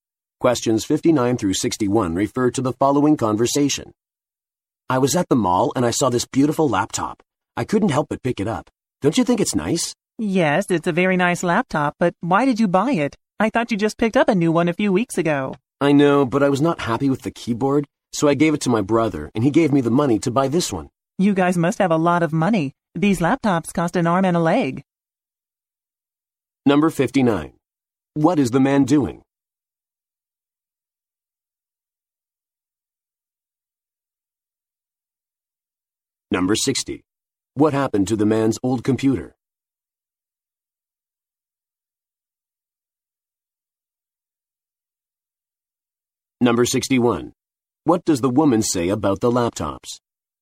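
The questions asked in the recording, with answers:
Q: What happened to the man's old computer?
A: He gave it to his brother

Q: What does the woman say about the laptops?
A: They are very expensive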